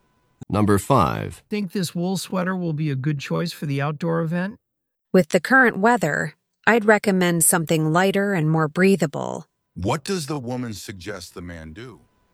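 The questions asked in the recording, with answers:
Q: What does the woman suggest the man do?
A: Wear something lighter and more breathable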